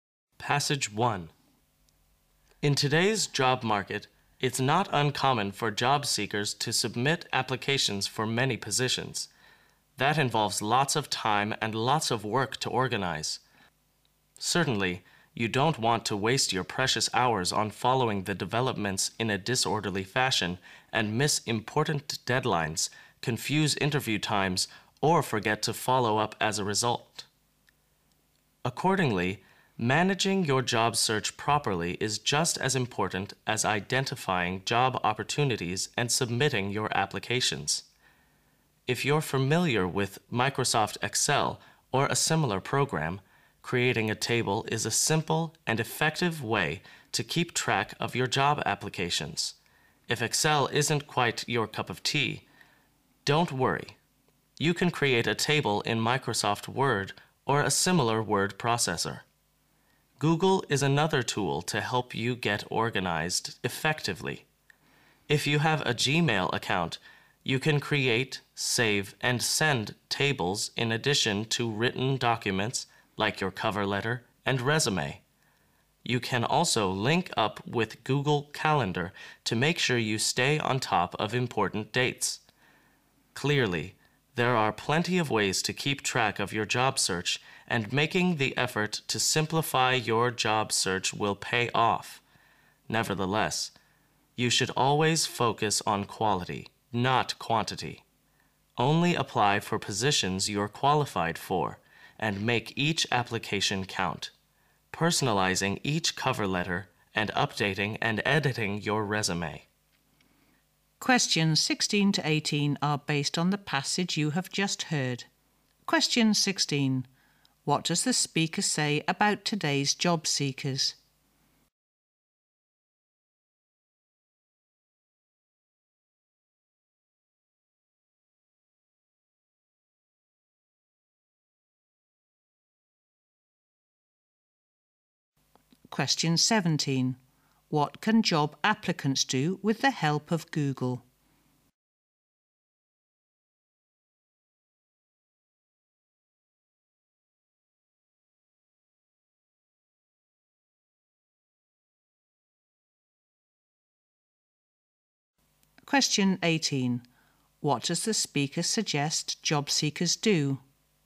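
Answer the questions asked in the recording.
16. They often apply for many positions
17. Create, save and send tables and documents and keep track of important dates
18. Focus on quality, not quantity; apply only for positions they are qualified for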